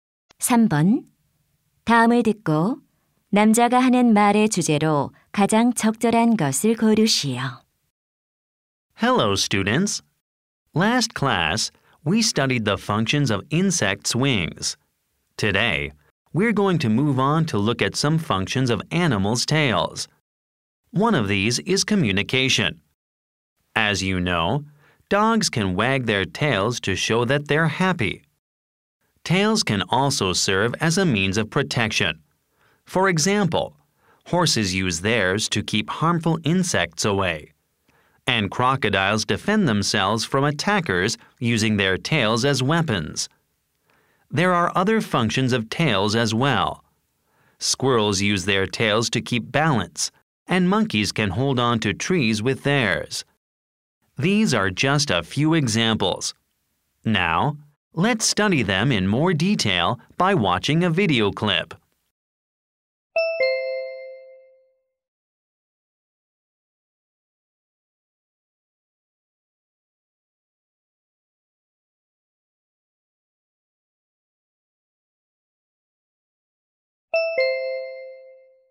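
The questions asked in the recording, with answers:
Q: 다음을 듣고 남자가 하는 말의 주제로 가장 적절한 것을 고르시오.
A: 동물 꼬리의 다양한 기능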